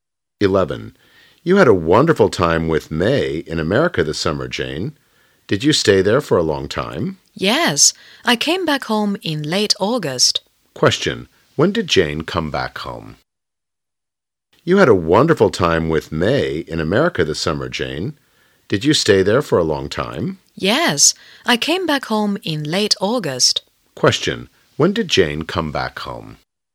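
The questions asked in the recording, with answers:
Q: Question, when did Jane come back home?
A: In late August.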